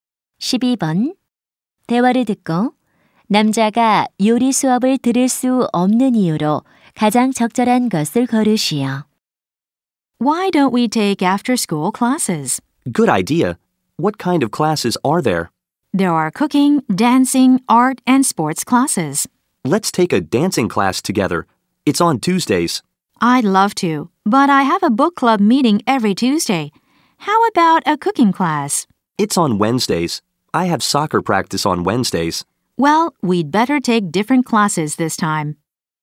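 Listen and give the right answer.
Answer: 수요일마다 축구 연습이 있어서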